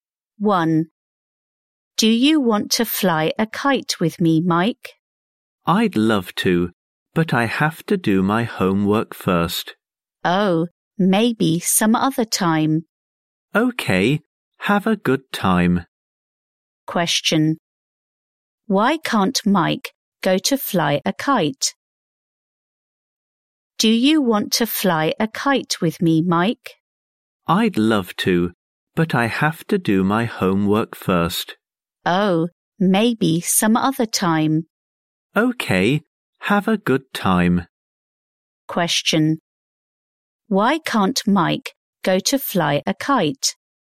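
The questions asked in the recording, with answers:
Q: Why can't Mike go to fly a kite?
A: He has to do his homework first.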